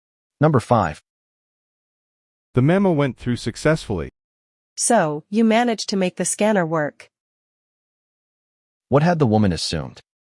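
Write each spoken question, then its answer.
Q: What had the woman assumed?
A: That the scanner was not working.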